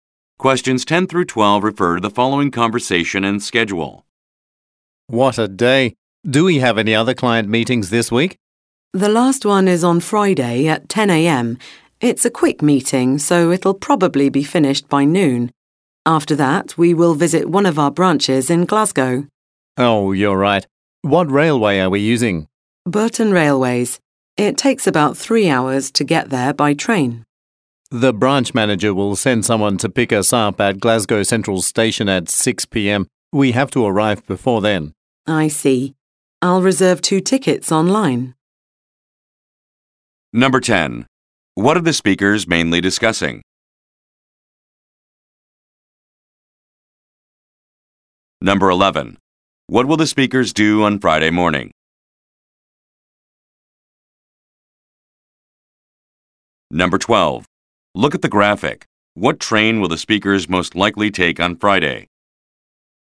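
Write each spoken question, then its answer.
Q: What are the speakers mainly discussing?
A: Their schedule for a business trip to a branch in Glasgow

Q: What will the speakers do on Friday morning?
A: Attend a client meeting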